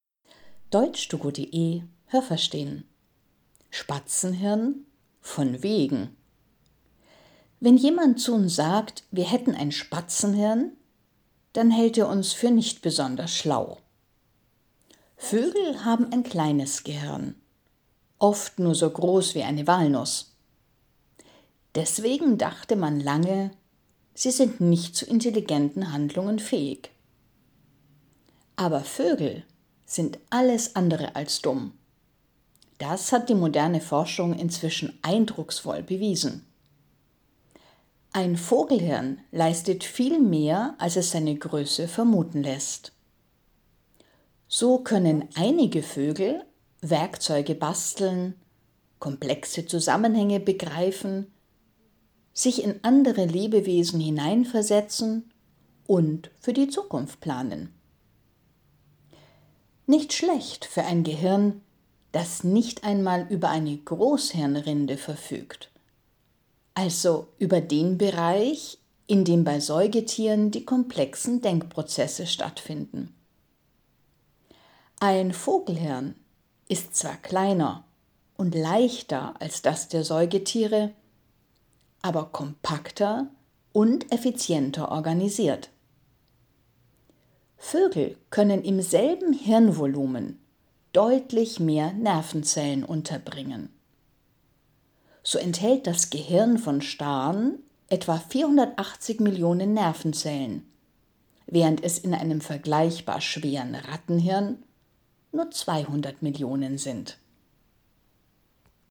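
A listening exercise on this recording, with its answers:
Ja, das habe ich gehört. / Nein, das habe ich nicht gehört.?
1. Wenn man sagt, eine Person hat ein Spatzenhirn, dann hält man sie für dumm.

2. Menschen denken, dass Vögel ein kleines Gehirn haben, aber in Wirklichkeit haben sie ein großes Gehirn.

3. Alle Vögel können komplexe Zusammenhänge erkennen.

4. Vögel besitzen wie Säugetiere auch eine Großhirnrinde, in der komplexe Denkprozesse stattfinden.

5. Das Gehirn der Vögel ist klein und leicht, aber sehr effizient.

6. Das Besondere am Vogelhirn ist die Dichte an Nervenzellen.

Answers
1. Ja, das habe ich gehört.
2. Nein, das habe ich nicht gehört.
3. Nein, das habe ich nicht gehört.
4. Nein, das habe ich nicht gehört.
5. Ja, das habe ich gehört.
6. Ja, das habe ich gehört.

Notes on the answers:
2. Ihr Gehirn ist klein, oft nur so groß wie eine Walnuss.
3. Nicht alle Vögel können das, aber einige sind dazu in der Lage.

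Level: C1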